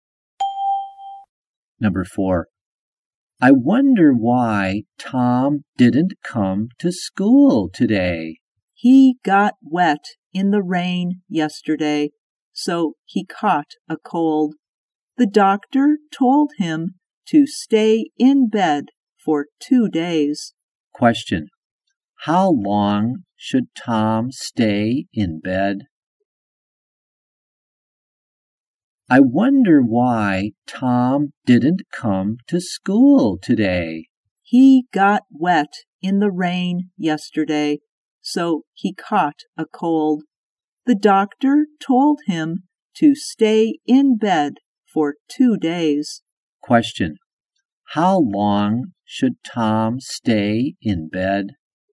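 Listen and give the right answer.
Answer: For 2 days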